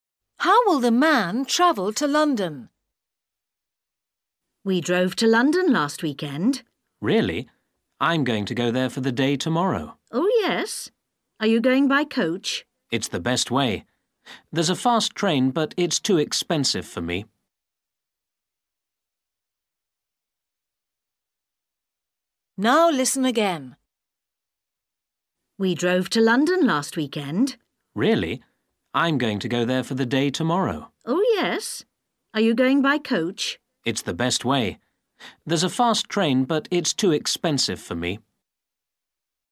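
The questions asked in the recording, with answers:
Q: How will the man travel to London?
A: By coach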